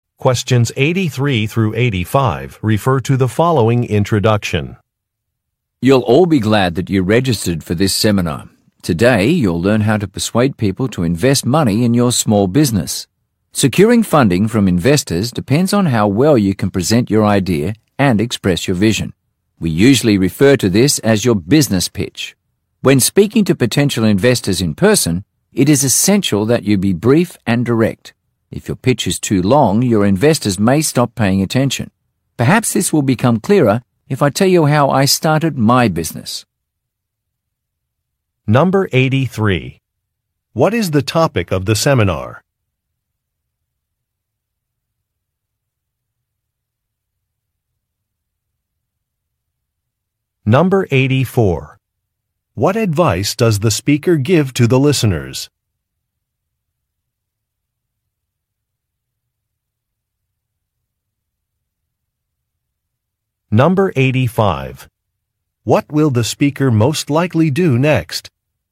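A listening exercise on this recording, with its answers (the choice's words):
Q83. What is the topic of the seminar?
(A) How to name your company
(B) How to find office space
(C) How to attract investors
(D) How to decide on an insurance policy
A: How to attract investors

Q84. What advice does the speaker give to the listeners?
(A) To keep a presentation short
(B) To create a personal Web site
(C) To hire a marketing consultant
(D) To read contracts carefully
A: To keep a presentation short

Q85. What will the speaker most likely do next?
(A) Divide the listeners in groups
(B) Relate a personal story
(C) Create a business plan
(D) Collect some registration forms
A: Relate a personal story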